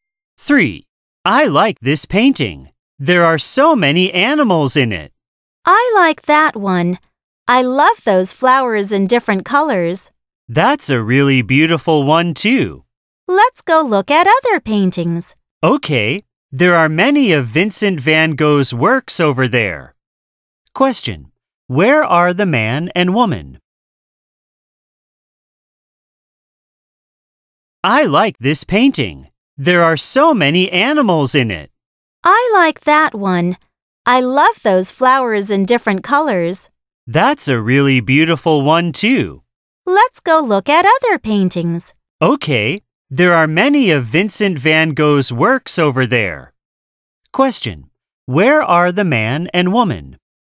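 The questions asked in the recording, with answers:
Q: Where are the man and woman?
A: At a museum (art gallery)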